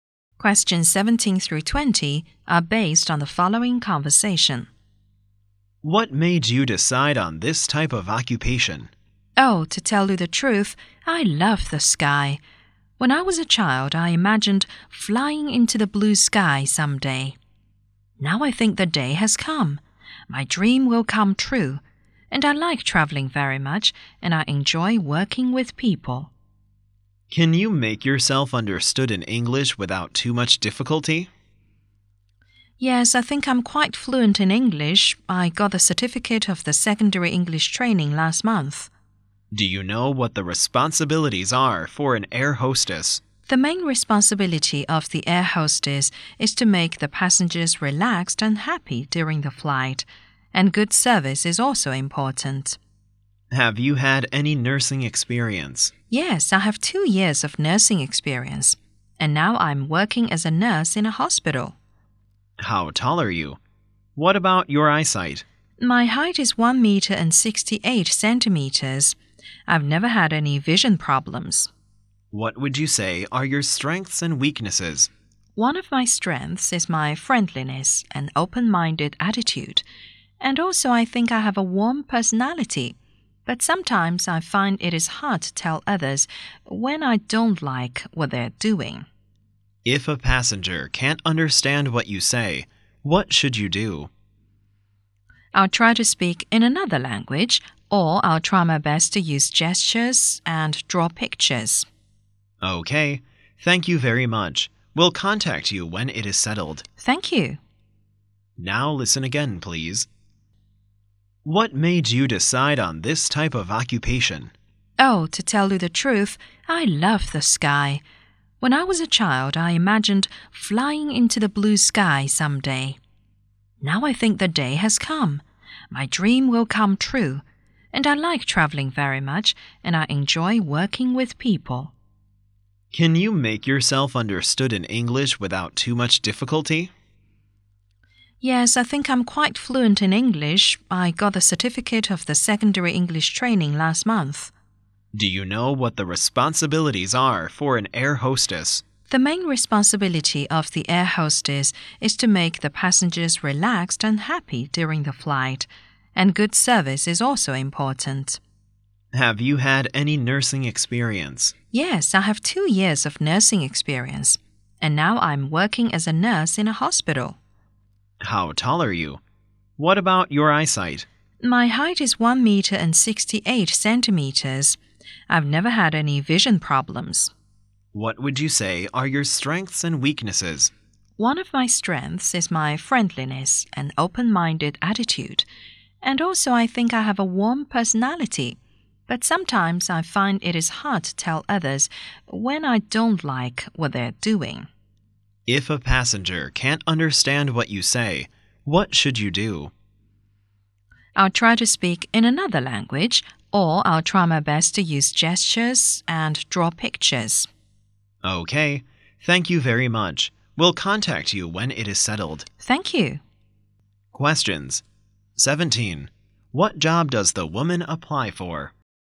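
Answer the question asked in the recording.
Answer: Air hostess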